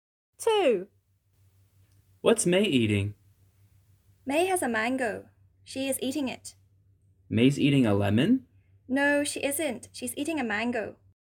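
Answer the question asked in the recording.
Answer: a mango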